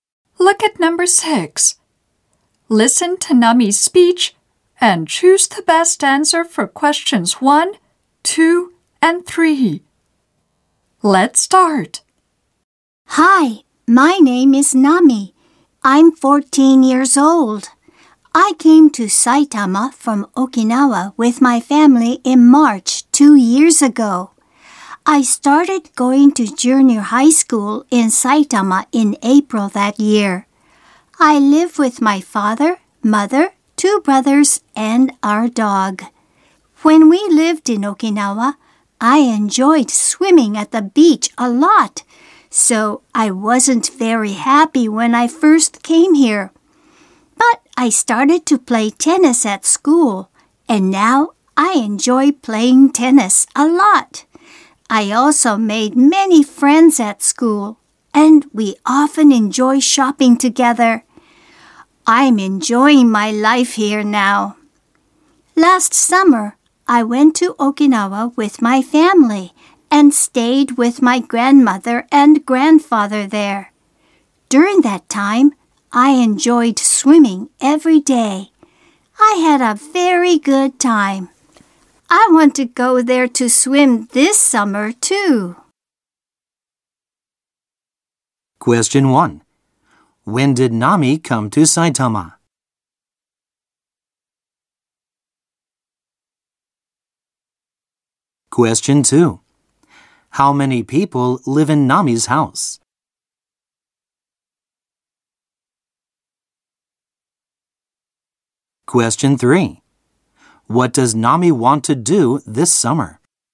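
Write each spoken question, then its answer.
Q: When did Nami come to Saitama?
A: In March two years ago.

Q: How many people live in Nami's house?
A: Five.

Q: What does Nami want to do this summer?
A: Go to Okinawa to swim.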